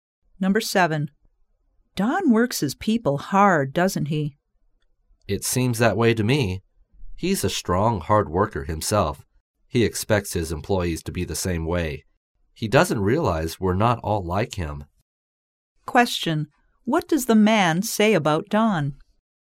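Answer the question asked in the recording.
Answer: He works hard and expects his employees to work as hard as he does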